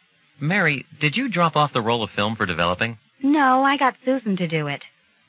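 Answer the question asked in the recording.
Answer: Susan dropped it off for developing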